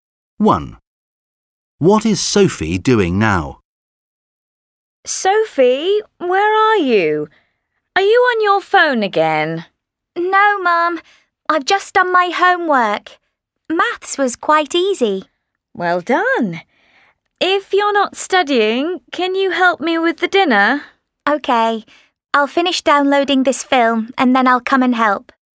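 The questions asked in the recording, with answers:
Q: What is Sophie doing now?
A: Downloading a film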